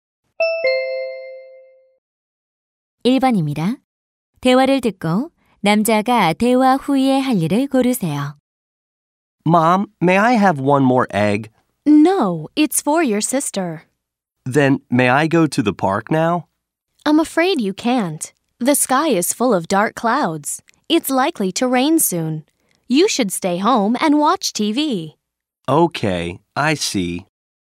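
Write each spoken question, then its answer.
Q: 대화를 듣고 남자가 대화 후에 할 일을 고르세요.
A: 집에서 TV 보기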